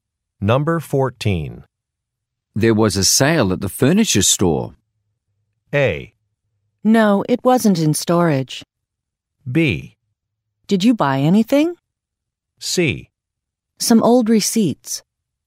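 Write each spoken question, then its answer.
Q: There was a sale at the furniture store.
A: B: Did you buy anything?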